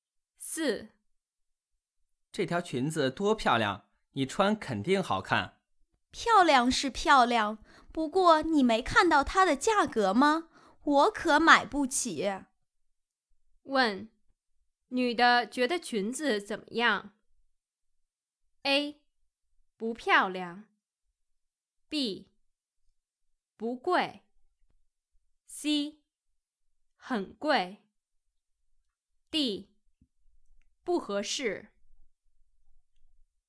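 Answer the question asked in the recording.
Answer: C: 很贵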